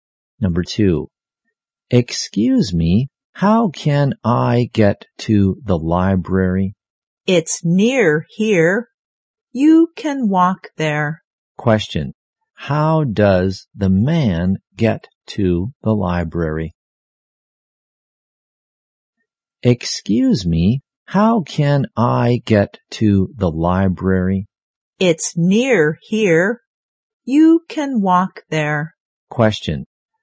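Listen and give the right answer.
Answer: He walks there.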